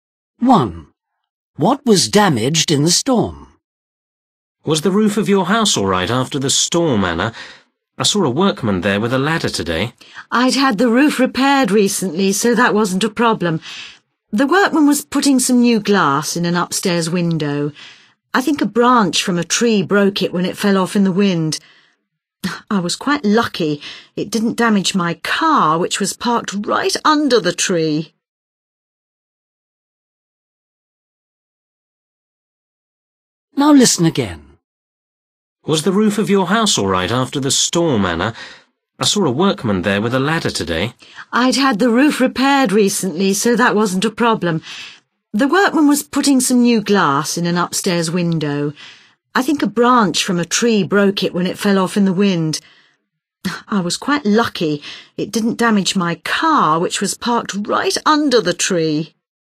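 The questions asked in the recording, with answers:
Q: What was damaged in the storm?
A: an upstairs window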